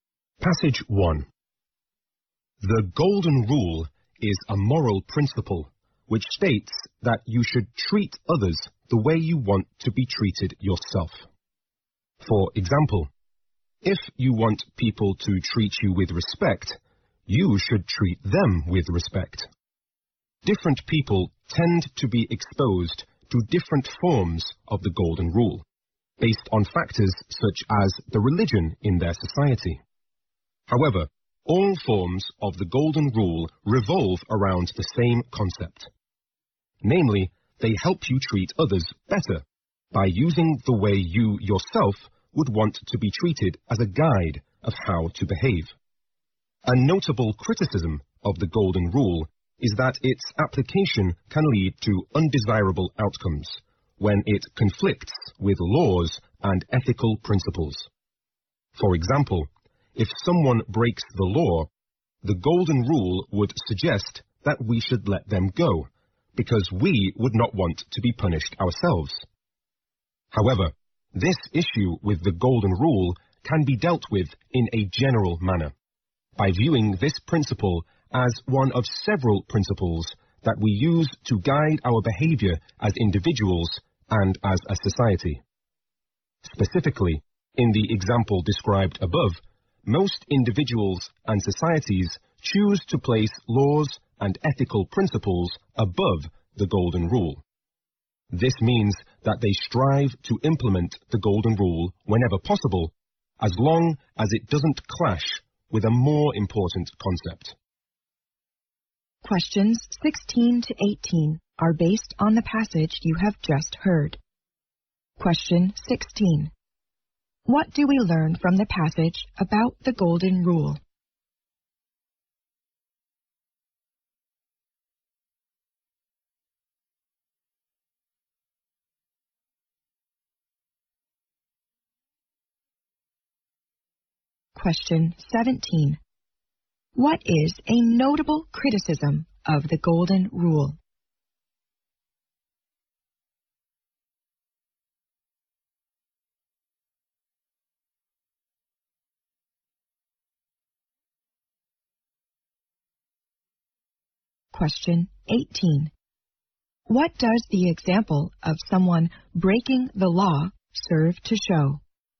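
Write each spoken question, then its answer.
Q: What do we learn from the passage about the Golden Rule?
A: It takes different forms, but all share the same idea of treating others as you want to be treated.

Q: What is a notable criticism of the Golden Rule?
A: Using it can lead to bad outcomes when it conflicts with laws and ethical principles.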